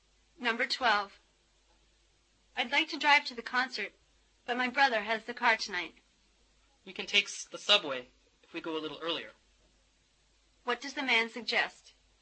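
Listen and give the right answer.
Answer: Take the subway and leave a little earlier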